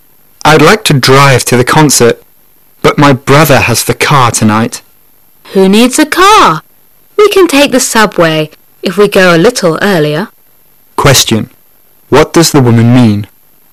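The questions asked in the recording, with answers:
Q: What does the woman mean?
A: They don't need a car; they can take the subway.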